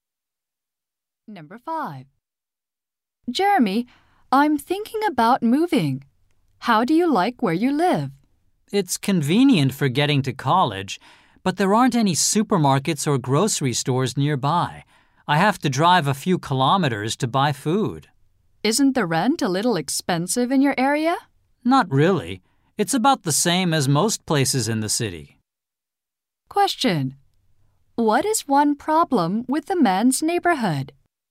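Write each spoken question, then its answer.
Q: What is one problem with the man's neighborhood?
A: There are no supermarkets or grocery stores nearby.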